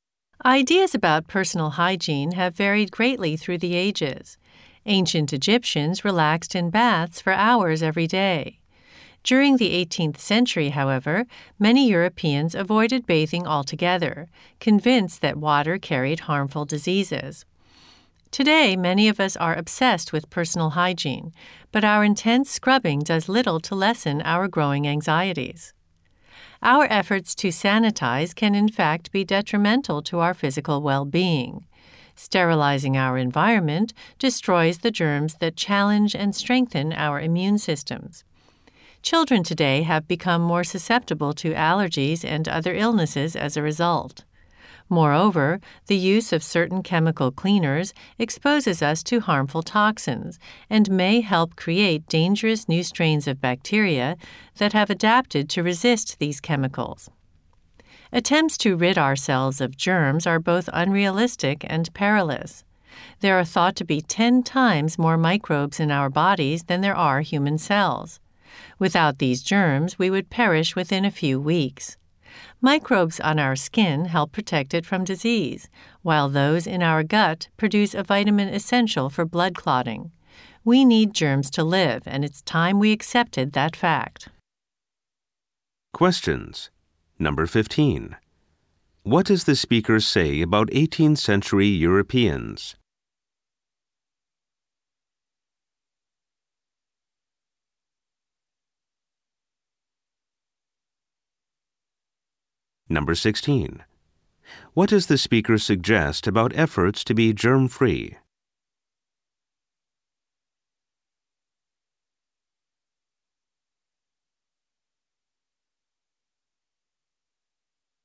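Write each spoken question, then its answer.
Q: What does the speaker say about 18th century Europeans?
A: Many avoided bathing, believing water carried harmful diseases.

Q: What does the speaker suggest about efforts to be germ-free?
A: They are unrealistic and can harm our health.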